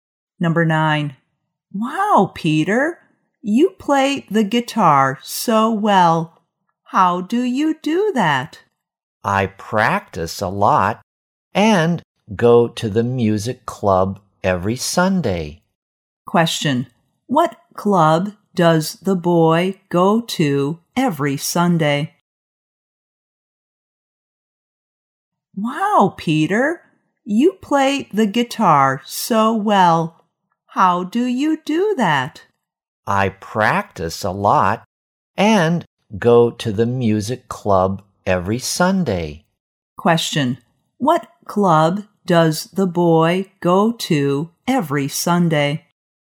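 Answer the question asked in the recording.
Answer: The music club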